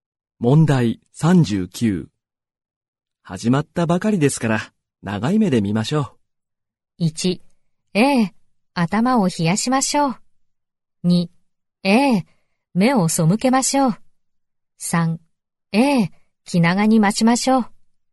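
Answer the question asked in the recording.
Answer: 3: ええ、気長に待ちましょう。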